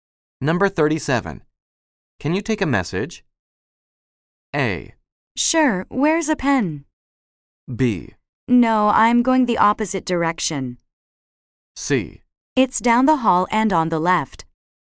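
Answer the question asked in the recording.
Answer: A: Sure, where's a pen?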